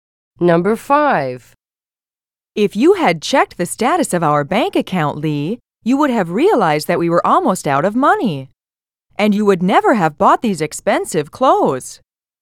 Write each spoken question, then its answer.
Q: If you had checked the status of our bank account, Lee, you would have realized that we were almost out of money.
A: Past is the correct answer.